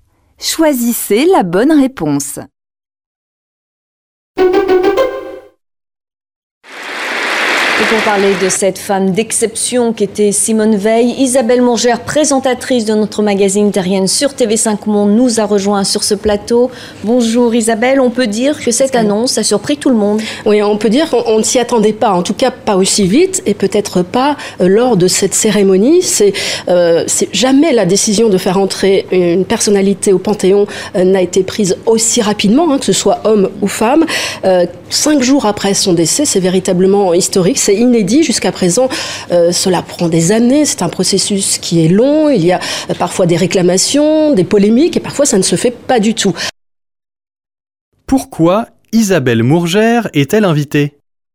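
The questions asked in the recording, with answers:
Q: Pourquoi Isabelle Mongère est-elle invitée ?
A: Pour parler de Simone Veil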